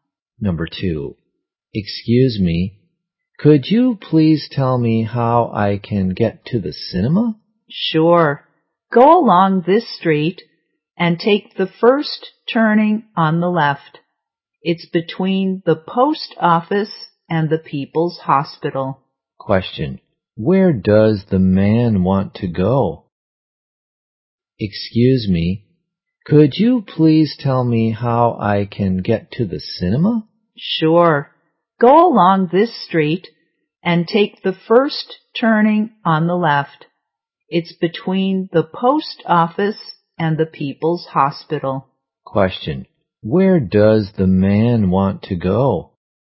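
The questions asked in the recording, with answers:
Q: Question, where does the man want to go?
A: The cinema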